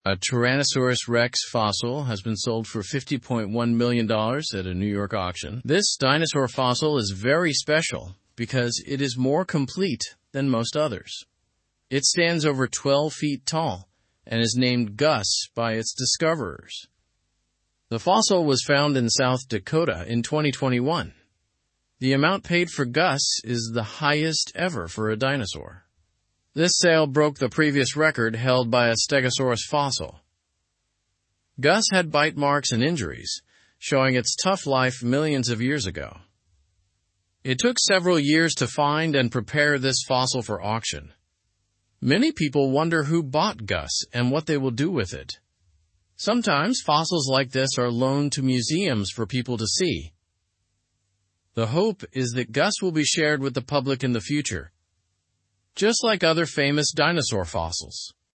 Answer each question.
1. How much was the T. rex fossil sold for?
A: The T. rex fossil was sold for $50.1 million.

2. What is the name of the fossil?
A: The fossil is named Gus.

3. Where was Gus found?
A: Gus was found in South Dakota.

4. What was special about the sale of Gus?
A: It was the highest amount ever paid for a dinosaur fossil.

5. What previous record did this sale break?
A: It broke the previous record held by a stegosaurus fossil.

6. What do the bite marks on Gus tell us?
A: The bite marks show it had a tough life millions of years ago.

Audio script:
A Tyrannosaurus rex fossil has been sold for $50.1 million at a New York auction. This dinosaur fossil is very special because it is more complete than most others. It stands over 12 feet tall and is named Gus by its discoverers. The fossil was found in South Dakota in 2021.
The amount paid for Gus is the highest ever for a dinosaur. This sale broke the previous record held by a stegosaurus fossil. Gus had bite marks and injuries, showing its tough life millions of years ago. It took several years to find and prepare this fossil for auction.
Many people wonder who bought Gus and what they will do with it. Sometimes, fossils like this are loaned to museums for people to see. The hope is that Gus will be shared with the public in the future, just like other famous dinosaur fossils.

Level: Level 2